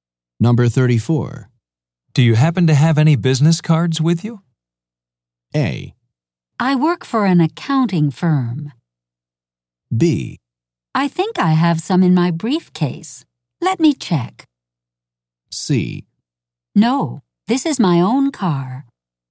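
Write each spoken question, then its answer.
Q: Do you happen to have any business cards with you?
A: B: I think I have some in my briefcase. Let me check.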